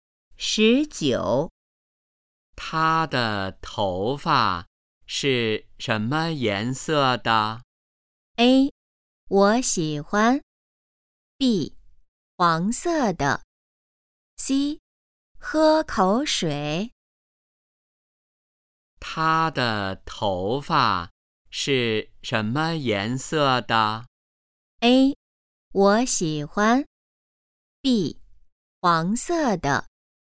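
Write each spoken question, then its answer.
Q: 他的头发是什么颜色的?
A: B: 黄色的。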